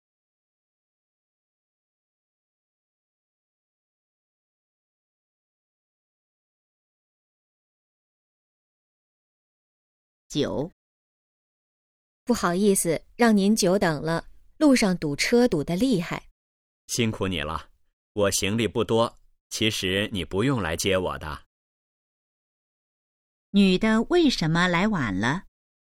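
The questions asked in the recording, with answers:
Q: 女的为什么来晚了?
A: 路上堵车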